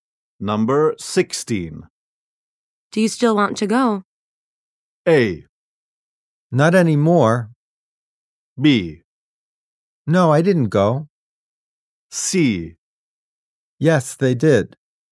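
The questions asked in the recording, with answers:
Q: Do you still want to go?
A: A: Not anymore.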